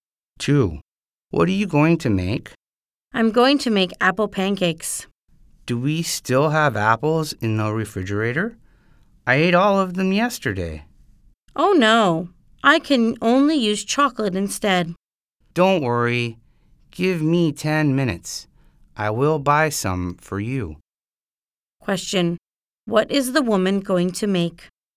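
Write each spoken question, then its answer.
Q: What is the woman going to make?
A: Apple pancakes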